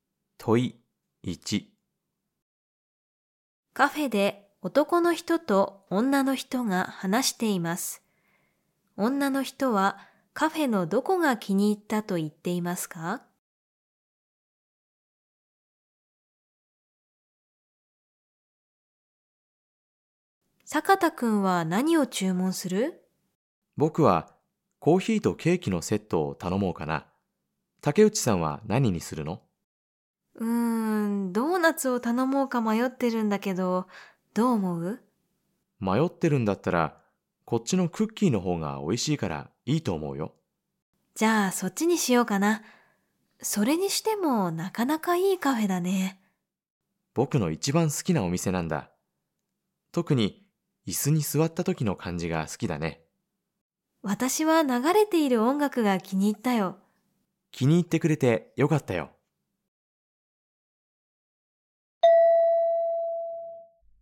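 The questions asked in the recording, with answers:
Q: 女の人はカフェのどこが気に入ったと言っていますか?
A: 流れている音楽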